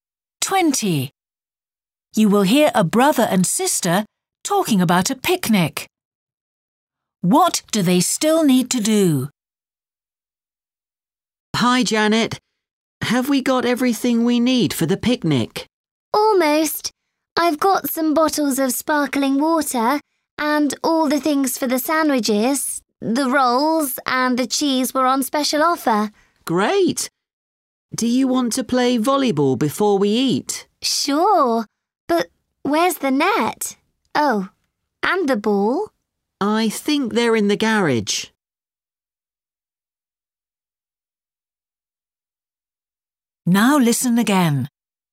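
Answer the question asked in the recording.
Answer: Find the volleyball net and ball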